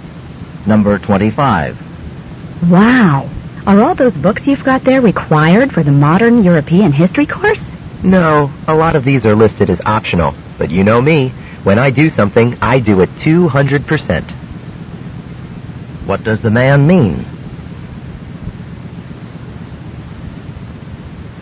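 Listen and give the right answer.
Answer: He reads the optional books too because he is very thorough.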